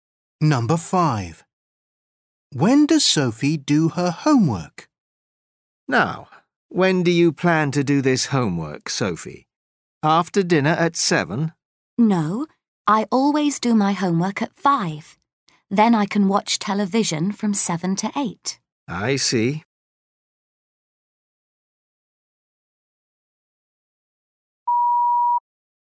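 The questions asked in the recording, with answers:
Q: When does Sophie do her homework?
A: At 5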